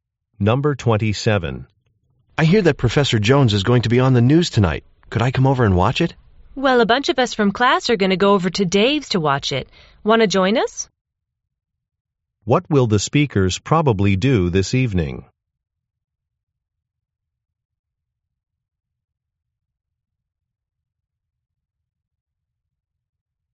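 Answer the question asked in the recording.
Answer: Watch the news at Dave's.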